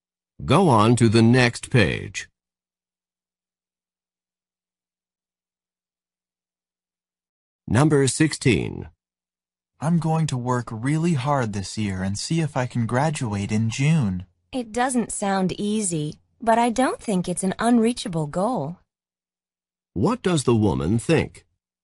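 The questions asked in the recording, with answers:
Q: What does the woman think?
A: The goal is hard but reachable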